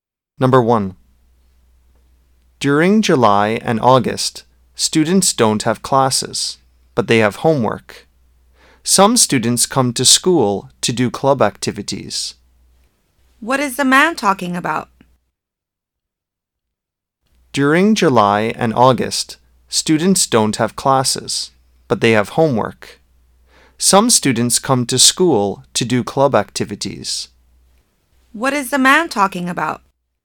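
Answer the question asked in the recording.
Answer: Summer vacation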